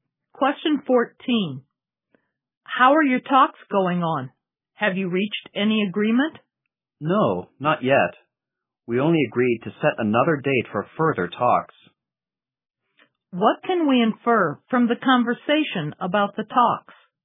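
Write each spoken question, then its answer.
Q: What can we infer from the conversation about the talks?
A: No agreement was reached; another round of talks will be held.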